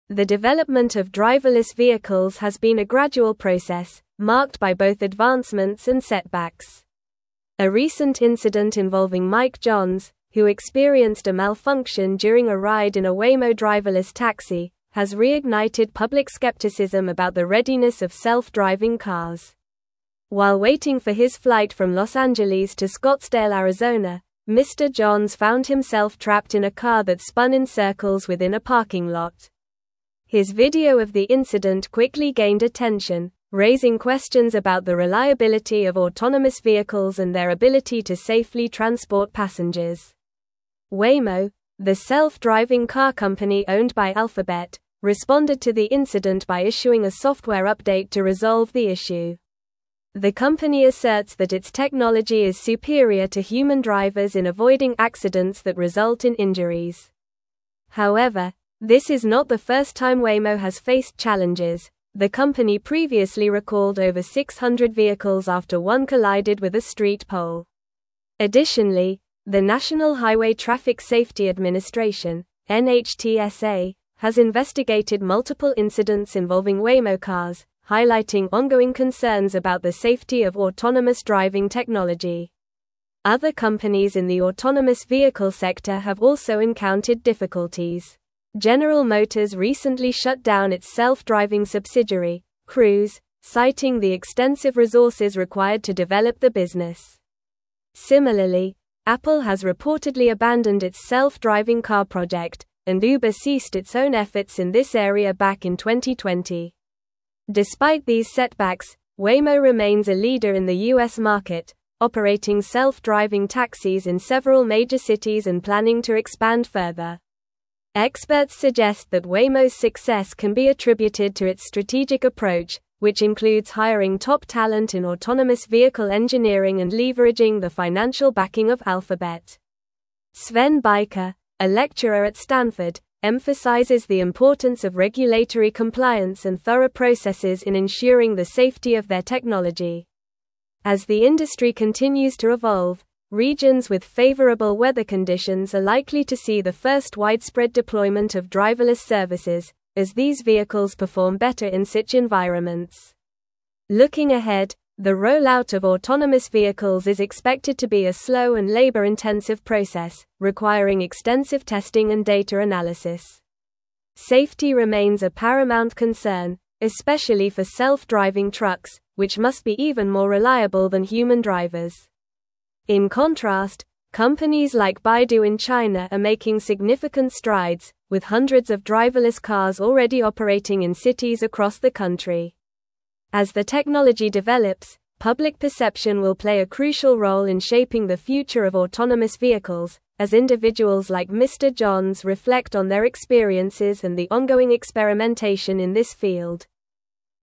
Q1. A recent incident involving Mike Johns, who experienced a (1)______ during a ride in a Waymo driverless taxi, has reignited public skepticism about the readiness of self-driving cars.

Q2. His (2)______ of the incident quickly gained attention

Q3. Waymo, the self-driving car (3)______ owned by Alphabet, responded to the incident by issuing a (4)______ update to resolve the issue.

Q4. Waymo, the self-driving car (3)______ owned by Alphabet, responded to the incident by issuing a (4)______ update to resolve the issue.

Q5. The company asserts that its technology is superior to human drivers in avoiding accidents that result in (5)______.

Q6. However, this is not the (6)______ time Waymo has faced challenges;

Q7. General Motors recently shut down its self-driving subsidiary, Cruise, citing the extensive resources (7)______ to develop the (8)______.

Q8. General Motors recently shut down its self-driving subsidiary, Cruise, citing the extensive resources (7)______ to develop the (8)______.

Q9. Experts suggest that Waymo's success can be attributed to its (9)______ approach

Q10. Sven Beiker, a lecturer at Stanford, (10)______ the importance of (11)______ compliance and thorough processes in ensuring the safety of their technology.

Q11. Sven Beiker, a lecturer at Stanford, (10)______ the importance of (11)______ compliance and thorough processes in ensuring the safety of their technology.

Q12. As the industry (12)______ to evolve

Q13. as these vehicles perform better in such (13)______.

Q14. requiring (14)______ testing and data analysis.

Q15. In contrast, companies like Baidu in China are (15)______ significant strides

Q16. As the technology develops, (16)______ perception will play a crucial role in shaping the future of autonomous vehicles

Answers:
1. malfunction
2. video
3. company
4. software
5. injuries
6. first
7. required
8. business
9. strategic
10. emphasizes
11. regulatory
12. continues
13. environments
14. extensive
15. making
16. public

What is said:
The development of driverless vehicles has been a gradual process, marked by both advancements and setbacks. A recent incident involving Mike Johns, who experienced a malfunction during a ride in a Waymo driverless taxi, has reignited public skepticism about the readiness of self-driving cars. While waiting for his flight from Los Angeles to Scottsdale, Arizona, Mr. Johns found himself trapped in a car that spun in circles within a parking lot. His video of the incident quickly gained attention, raising questions about the reliability of autonomous vehicles and their ability to safely transport passengers.
Waymo, the self-driving car company owned by Alphabet, responded to the incident by issuing a software update to resolve the issue. The company asserts that its technology is superior to human drivers in avoiding accidents that result in injuries. However, this is not the first time Waymo has faced challenges; the company previously recalled over 600 vehicles after one collided with a street pole. Additionally, the National Highway Traffic Safety Administration (NHTSA) has investigated multiple incidents involving Waymo cars, highlighting ongoing concerns about the safety of autonomous driving technology.
Other companies in the autonomous vehicle sector have also encountered difficulties. General Motors recently shut down its self-driving subsidiary, Cruise, citing the extensive resources required to develop the business. Similarly, Apple has reportedly abandoned its self-driving car project, and Uber ceased its own efforts in this area back in 2020. Despite these setbacks, Waymo remains a leader in the U.S. market, operating self-driving taxis in several major cities and planning to expand further.
Experts suggest that Waymo's success can be attributed to its strategic approach, which includes hiring top talent in autonomous vehicle engineering and leveraging the financial backing of Alphabet. Sven Beiker, a lecturer at Stanford, emphasizes the importance of regulatory compliance and thorough processes in ensuring the safety of their technology. As the industry continues to evolve, regions with favorable weather conditions are likely to see the first widespread deployment of driverless services, as these vehicles perform better in such environments.
Looking ahead, the rollout of autonomous vehicles is expected to be a slow and labor-intensive process, requiring extensive testing and data analysis. Safety remains a paramount concern, especially for self-driving trucks, which must be even more reliable than human drivers. In contrast, companies like Baidu in China are making significant strides, with hundreds of driverless cars already operating in cities across the country. As the technology develops, public perception will play a crucial role in shaping the future of autonomous vehicles, as individuals like Mr. Johns reflect on their experiences and the ongoing experimentation in this field.

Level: Level 4